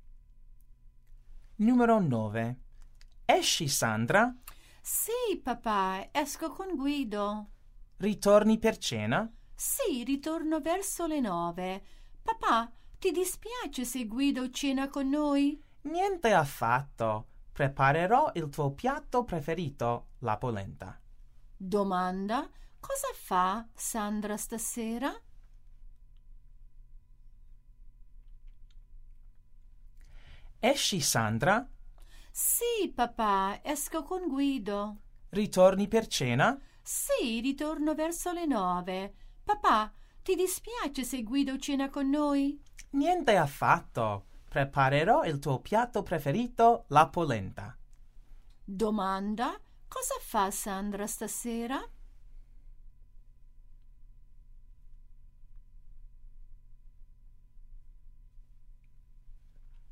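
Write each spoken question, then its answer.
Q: Cosa fa Sandra stasera?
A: Esce con Guido e torna a cena con lui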